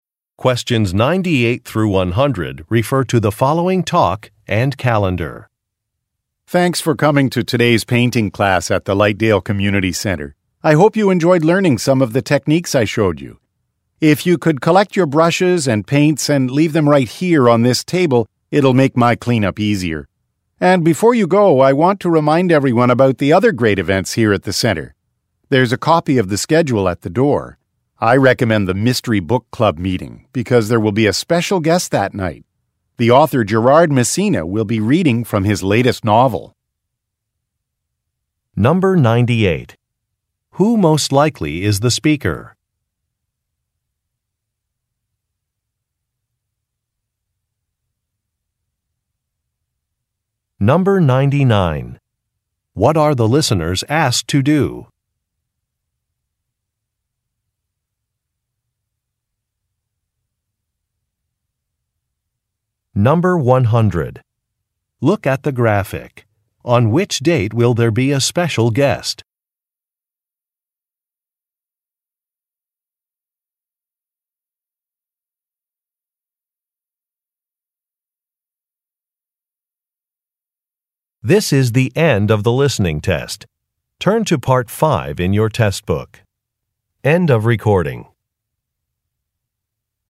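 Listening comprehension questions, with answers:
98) Who most likely is the speaker?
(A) A musician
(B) An actor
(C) A writing instructor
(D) An art teacher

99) What are the listeners asked to do?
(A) Arrive early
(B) Help clean an area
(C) Silence mobile phones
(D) Provide feedback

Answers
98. D
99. B

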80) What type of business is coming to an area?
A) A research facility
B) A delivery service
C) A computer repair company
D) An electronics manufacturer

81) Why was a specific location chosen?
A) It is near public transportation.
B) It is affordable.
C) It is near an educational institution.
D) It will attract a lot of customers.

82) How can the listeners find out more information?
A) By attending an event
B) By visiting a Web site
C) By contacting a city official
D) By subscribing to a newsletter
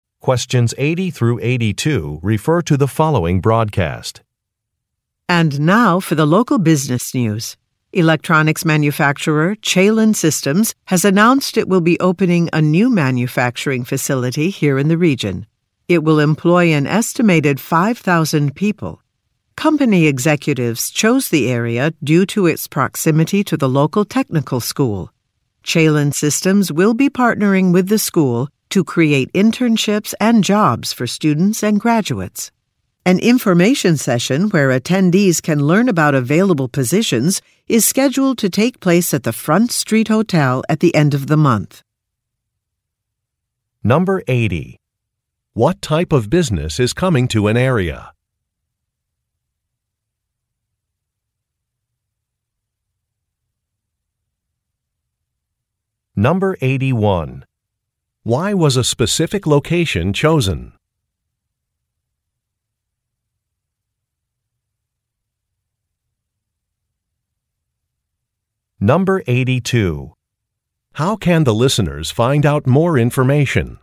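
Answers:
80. D
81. C
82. A

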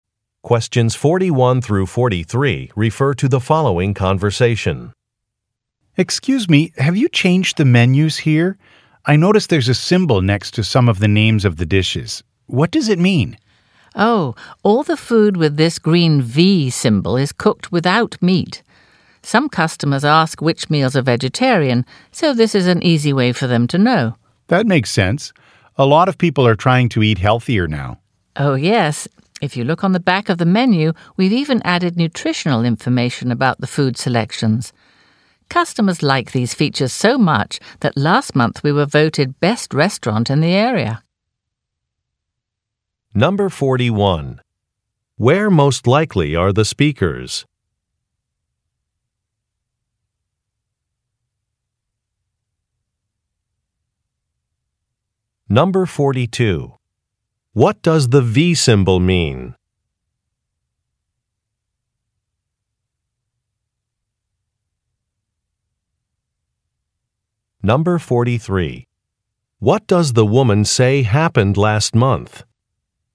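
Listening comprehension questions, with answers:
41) Where most likely are the speakers?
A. At a restaurant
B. At a cooking school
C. At a conference banquet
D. At a supermarket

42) What does the "V" symbol mean?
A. The recipe is available online.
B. The dish is vegetarian.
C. The dish is very spicy.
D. The ingredients vary with the season.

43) What does the woman say happened last month?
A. They opened a new location.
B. They hired an additional chef.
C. They held an outdoor festival.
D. They won a local award.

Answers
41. A
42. B
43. D

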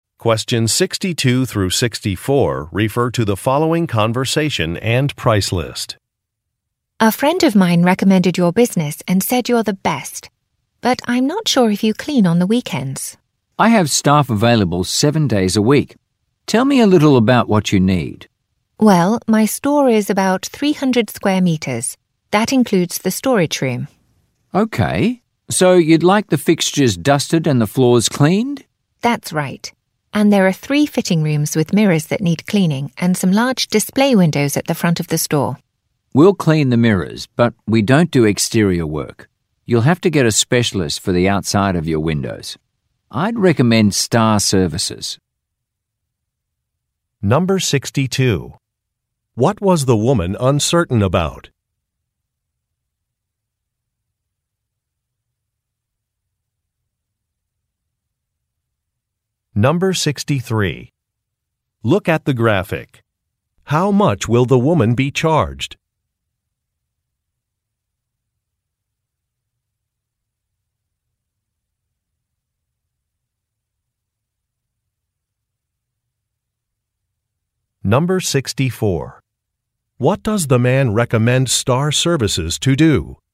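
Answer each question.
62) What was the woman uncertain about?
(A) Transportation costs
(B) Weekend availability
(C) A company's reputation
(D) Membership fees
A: B

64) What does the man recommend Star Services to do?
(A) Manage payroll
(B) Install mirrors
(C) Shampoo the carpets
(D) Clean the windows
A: D

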